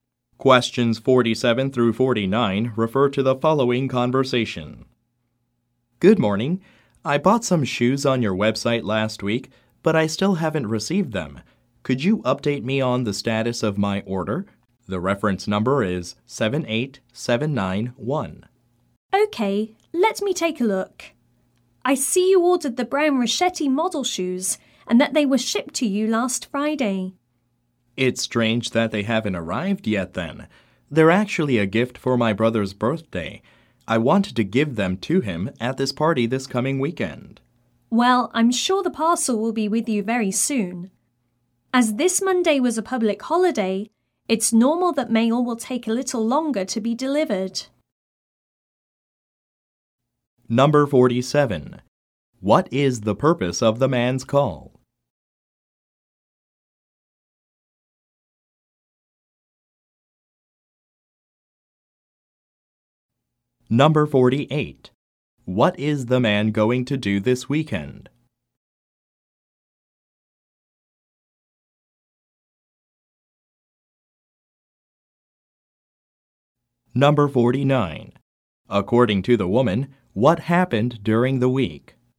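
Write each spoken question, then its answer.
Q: What is the purpose of the man's call?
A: To check the status of a shoe order he hasn't received

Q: What is the man going to do this weekend?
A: Go to his brother's birthday party

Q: According to the woman, what happened during the week?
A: There was a public holiday on Monday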